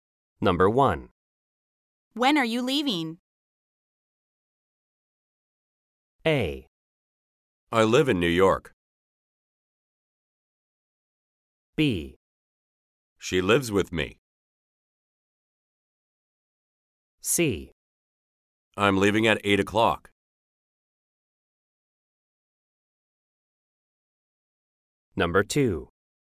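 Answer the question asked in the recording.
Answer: C: I'm leaving at 8 o'clock.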